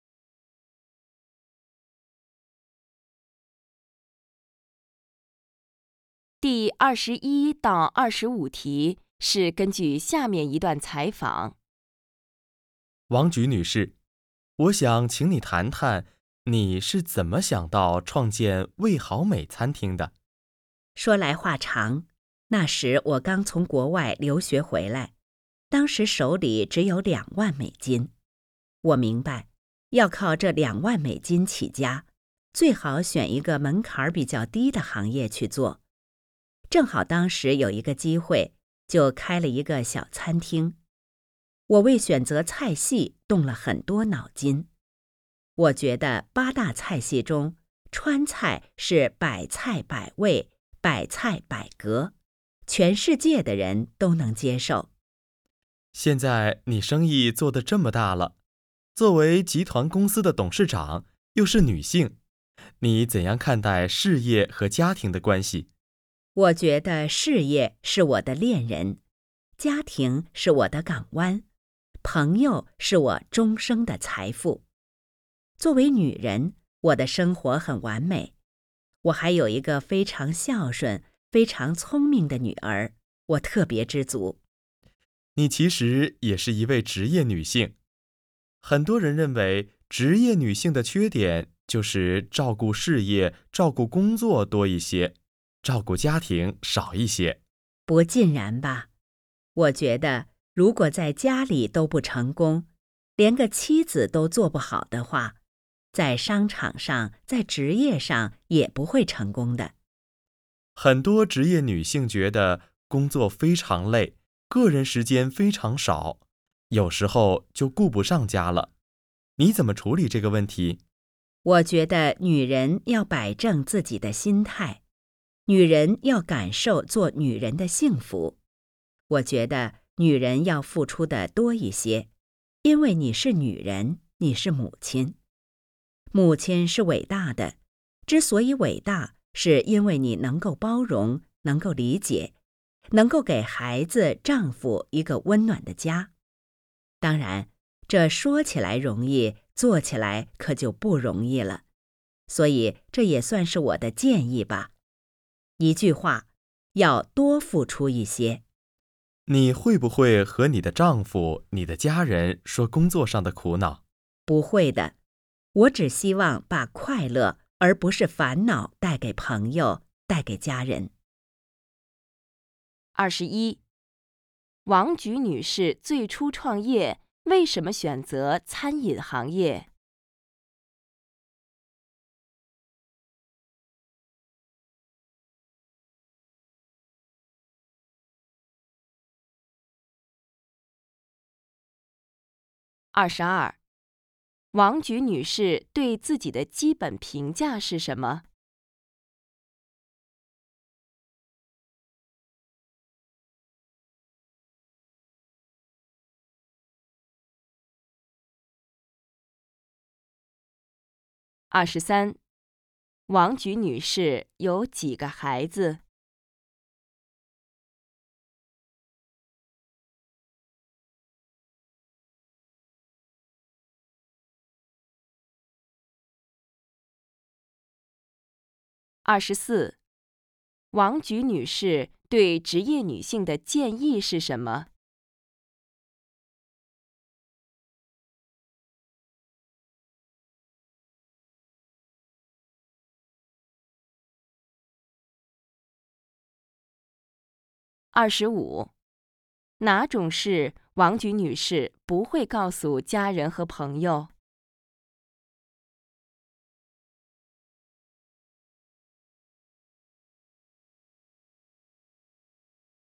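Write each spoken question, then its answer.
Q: 王菊女士最初创业,为什么选择餐饮行业?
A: 资金少,餐饮业门槛比较低

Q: 王菊女士对自己的基本评价是什么?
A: 作为女人生活很完美,很知足

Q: 王菊女士有几个孩子?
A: 一个女儿

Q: 王菊女士对职业女性的建议是什么?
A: 要多付出一些

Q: 哪种事王菊女士不会告诉家人和朋友?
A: 工作上的苦恼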